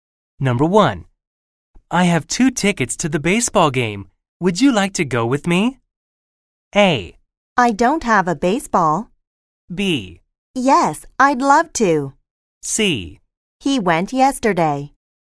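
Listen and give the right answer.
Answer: B: Yes, I'd love to.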